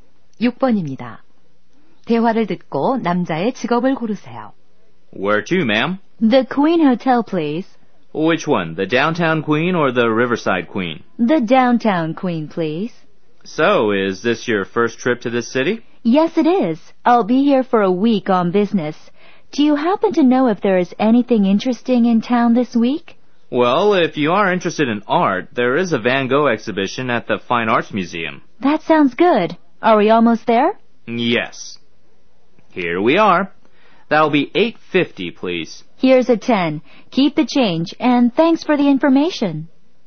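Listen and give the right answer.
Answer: 택시 기사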